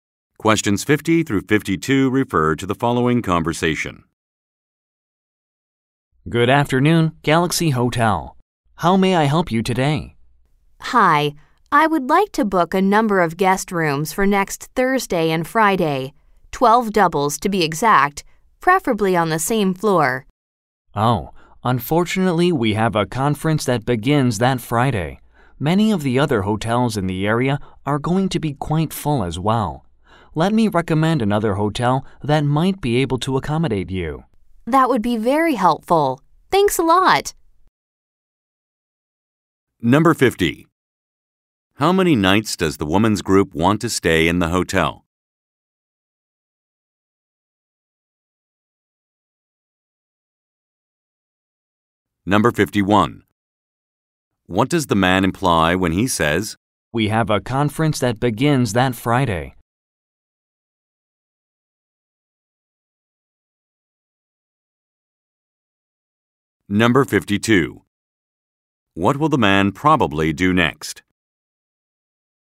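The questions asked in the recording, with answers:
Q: How many nights does the woman's group want to stay in the hotel?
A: Two nights (Thursday and Friday)

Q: What does the man imply when he says, "We have a conference that begins that Friday"?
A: The hotel does not have enough rooms available

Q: What will the man probably do next?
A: Recommend another hotel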